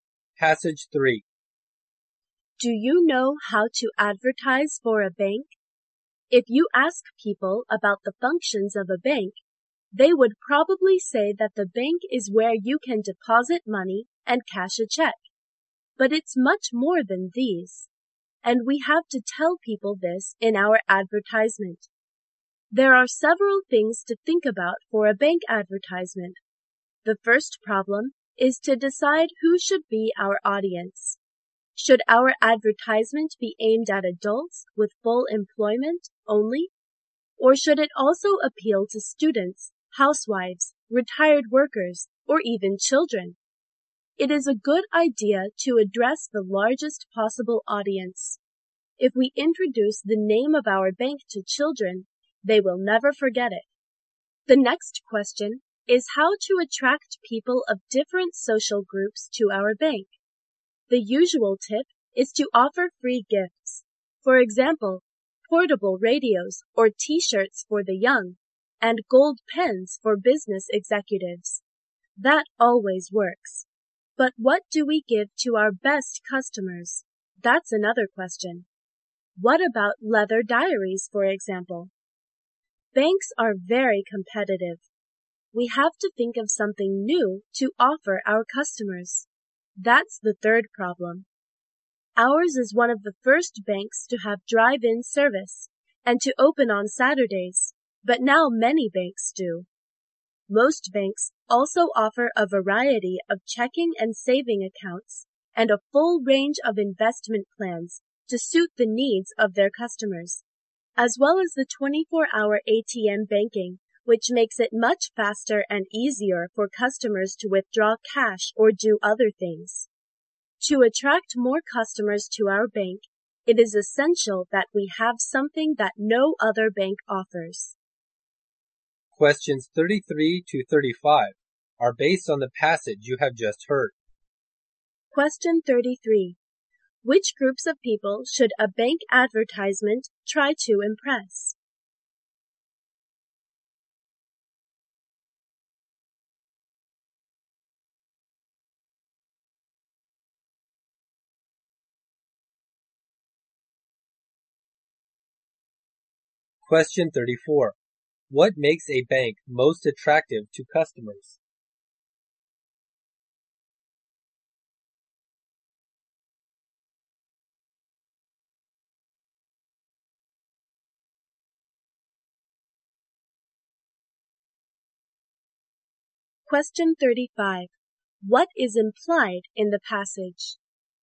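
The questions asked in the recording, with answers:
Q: Which groups of people should a bank advertisement try to impress?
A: The largest possible audience, including children

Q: What makes a bank most attractive to customers?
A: Offering something no other bank offers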